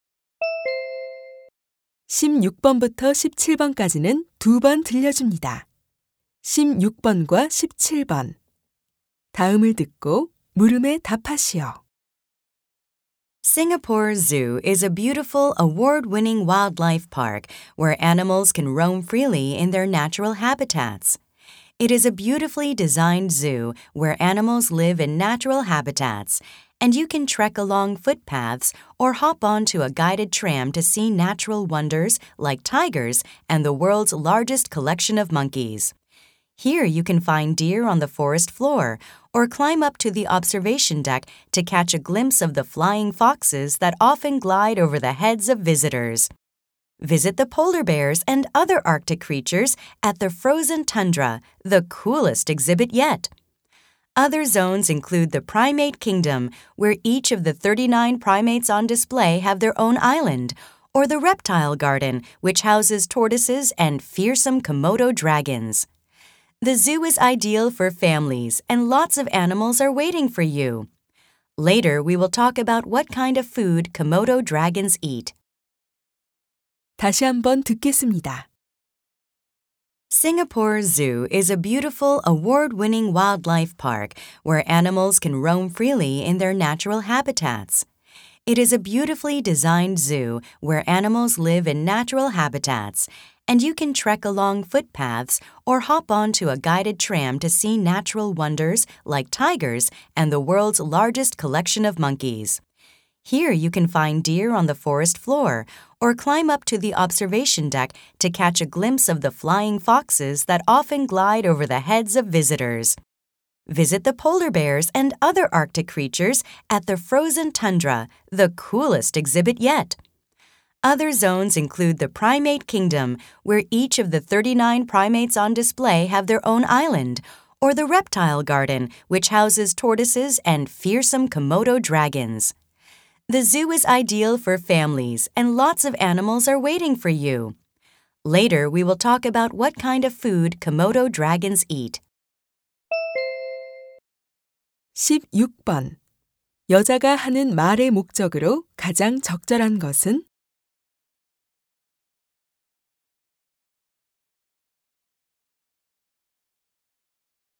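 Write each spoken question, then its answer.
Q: 여자가 하는 말의 목적으로 가장 적절한 것은?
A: 싱가포르 동물원을 소개하려고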